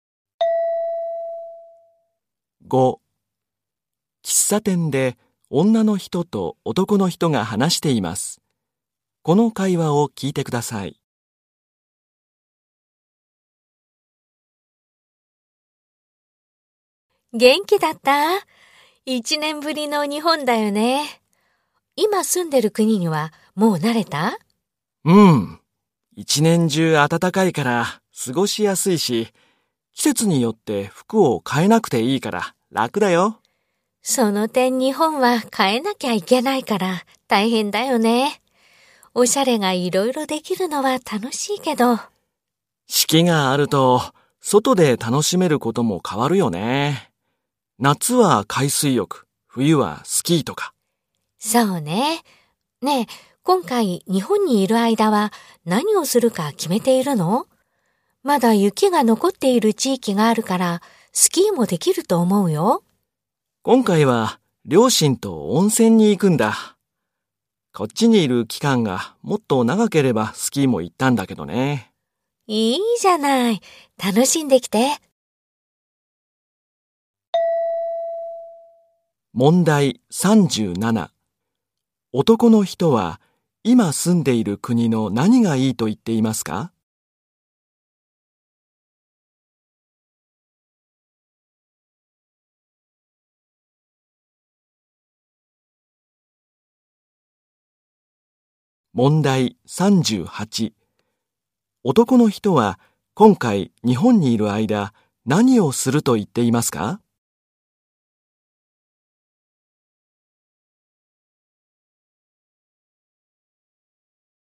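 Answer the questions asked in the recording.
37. 一年中暖かく、季節で服を変えなくていいこと
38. 両親と温泉に行く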